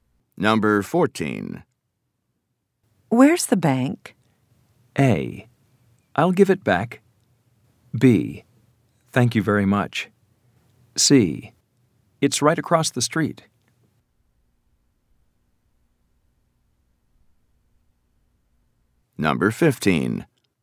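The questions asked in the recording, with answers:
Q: Where's the bank?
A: C: It's right across the street.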